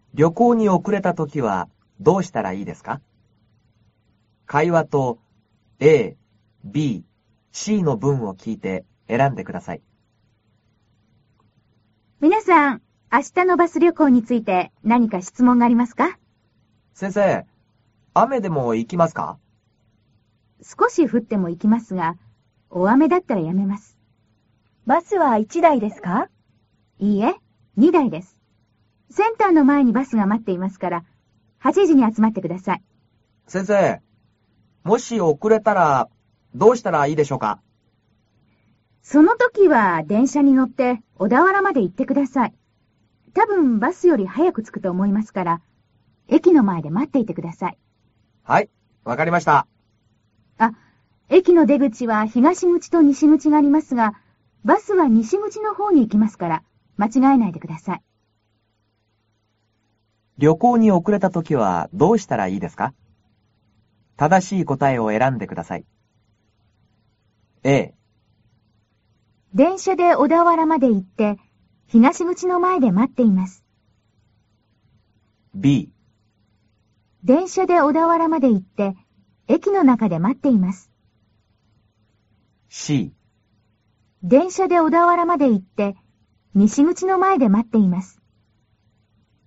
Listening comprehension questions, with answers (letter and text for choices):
正しい答えを選んでください。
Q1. 旅行に遅れたときは、どうしたらいいですか。正しい答えを選んでください。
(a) 電車で小田原まで行って、東口の前で待っています。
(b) 電車で小田原まで行って、駅の中で待っています。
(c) 電車で小田原まで行って、西口の前で、待っています。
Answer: (c) 電車で小田原まで行って、西口の前で、待っています。